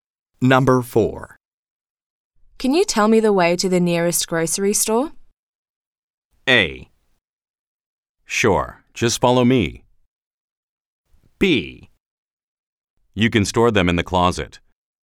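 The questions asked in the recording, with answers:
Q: Can you tell me the way to the nearest grocery store?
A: A: Sure, just follow me.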